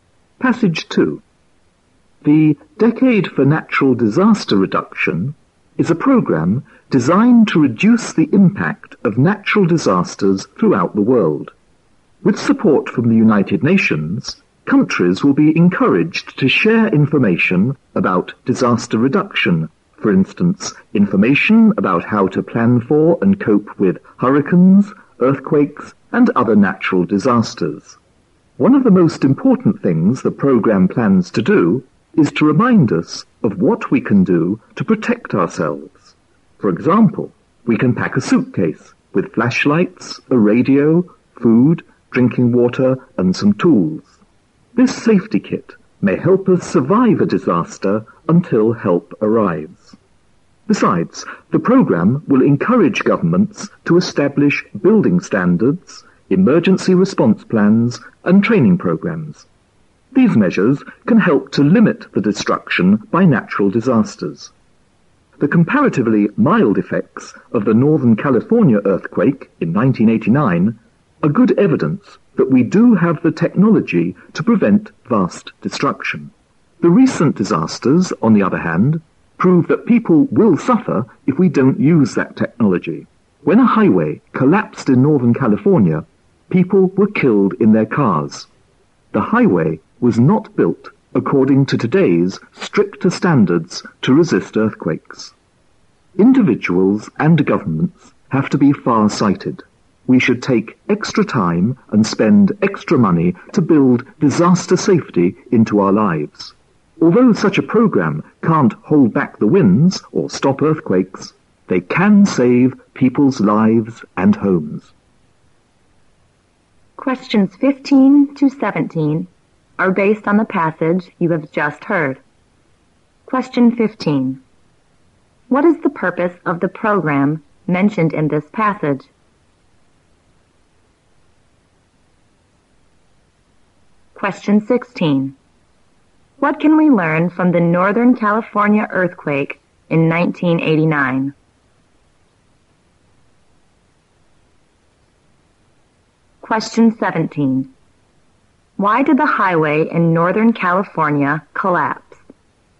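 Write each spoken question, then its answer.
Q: What is the purpose of the program mentioned in this passage?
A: To reduce the impact of natural disasters around the world

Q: What can we learn from the Northern California earthquake in 1989?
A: We have the technology to prevent vast destruction

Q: Why did the highway in Northern California collapse?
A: It was not built to today's stricter earthquake standards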